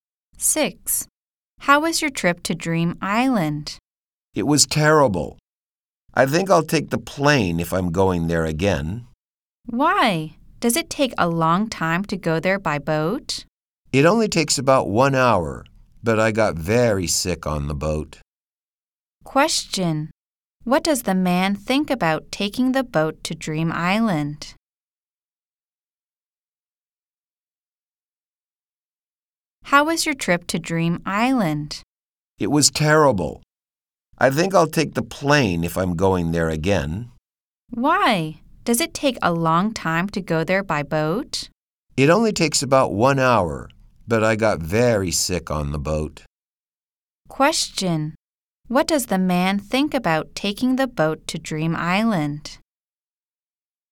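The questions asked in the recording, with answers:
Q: Question. What does the man think about taking the boat to Dream Island?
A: It was terrible because he got seasick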